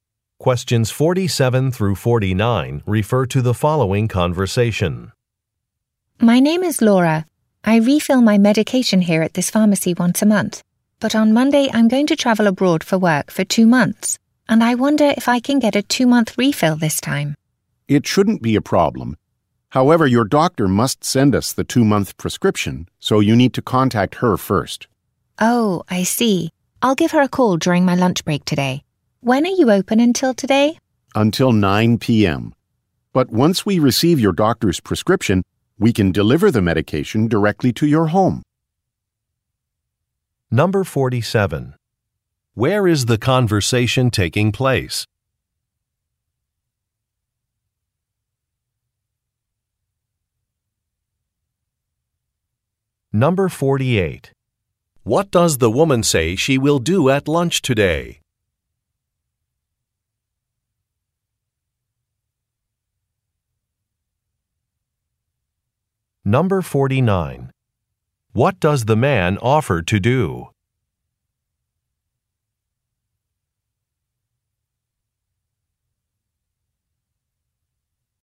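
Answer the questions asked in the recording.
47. At a pharmacy
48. Call her doctor
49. Deliver the medication to her home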